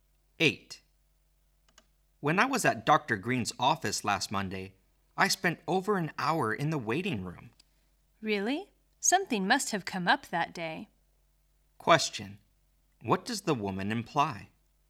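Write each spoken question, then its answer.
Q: What does the woman imply?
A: Something unexpected probably happened to delay Dr. Green that day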